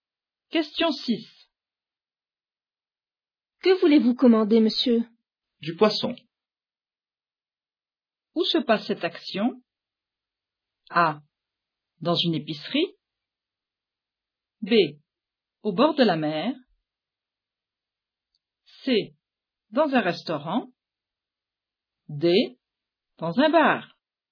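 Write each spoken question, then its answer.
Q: Où se passe cette action?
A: C: Dans un restaurant.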